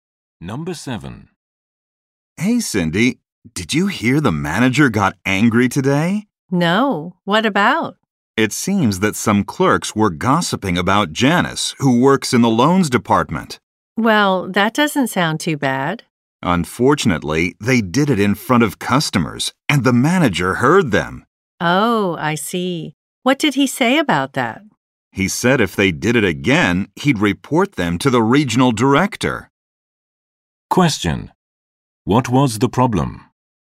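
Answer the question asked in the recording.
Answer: Some clerks gossiped about a coworker in front of customers.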